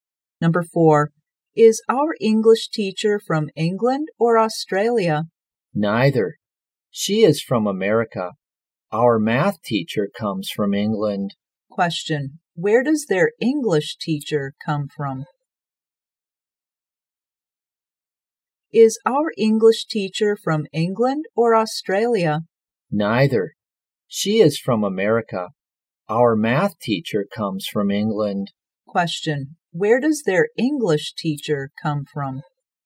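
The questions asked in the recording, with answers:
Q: Question, where does their English teacher come from?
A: America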